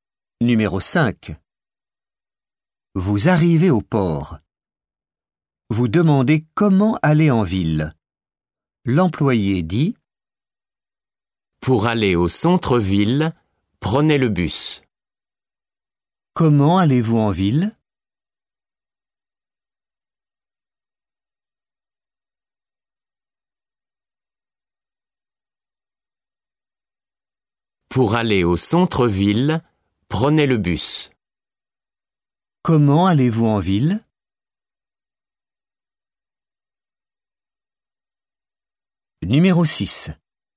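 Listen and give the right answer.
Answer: en bus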